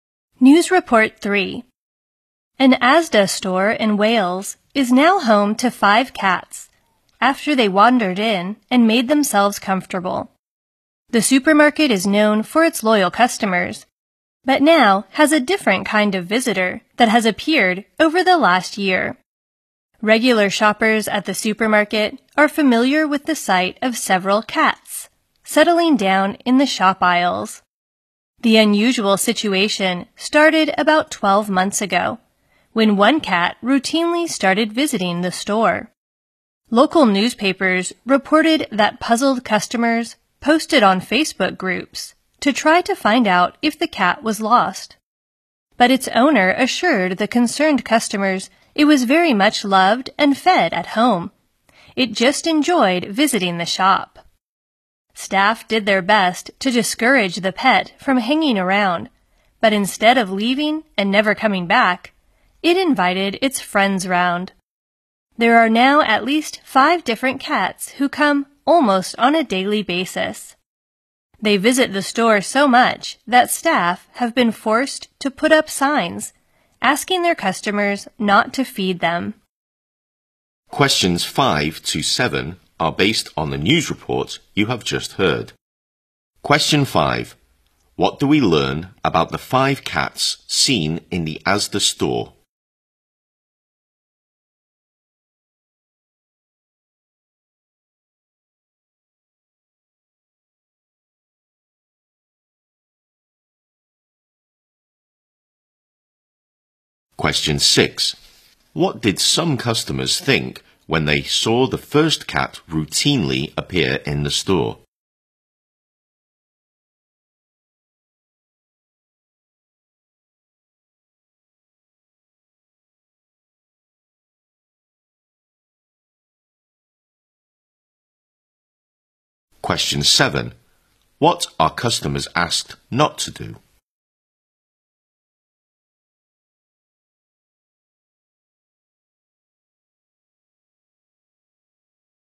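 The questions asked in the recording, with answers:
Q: What do we learn about the 5 cats seen in the Asda store?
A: They come to the store almost daily and settle in the aisles

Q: What did some customers think when they saw the first cat routinely appear in the store?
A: That the cat was lost

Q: What are customers asked not to do?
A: Feed the cats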